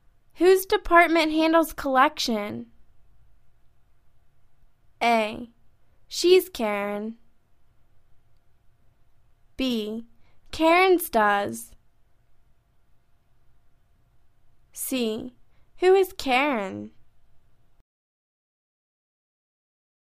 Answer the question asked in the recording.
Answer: Karen's does.